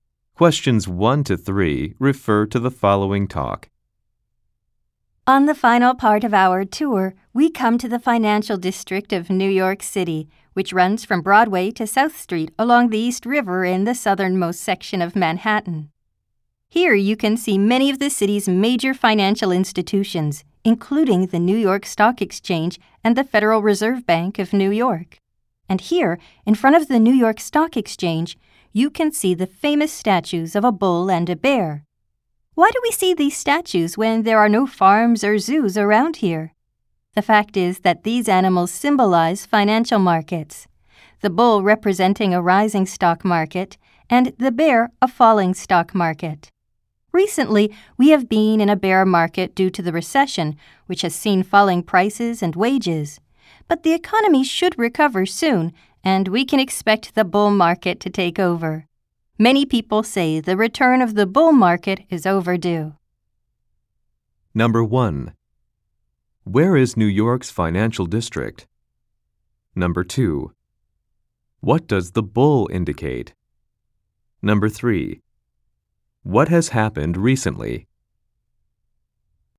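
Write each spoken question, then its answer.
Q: Where is New York's financial district?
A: In the southernmost section of Manhattan, from Broadway to South Street along the East River

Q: What does the bull indicate?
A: A rising stock market

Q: What has happened recently?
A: A bear market due to the recession, with falling prices and wages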